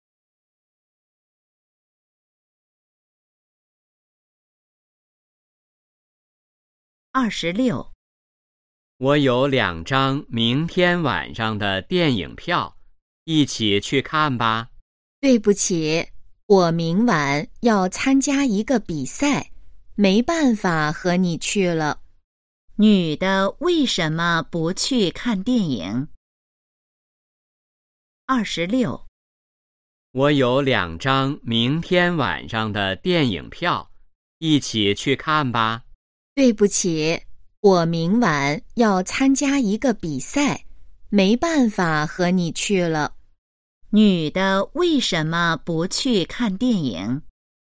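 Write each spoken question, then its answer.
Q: 女的为什么不去看电影?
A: 要参加比赛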